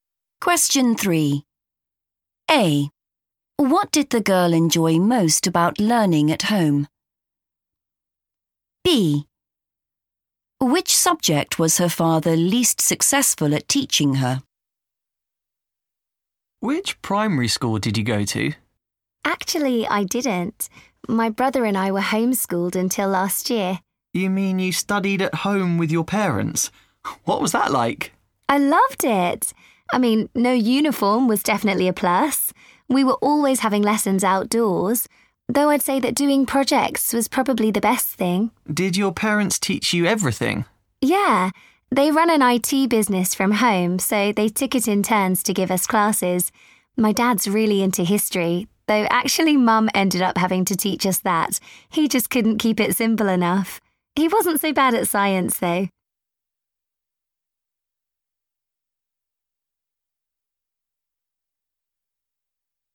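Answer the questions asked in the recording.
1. doing projects
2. history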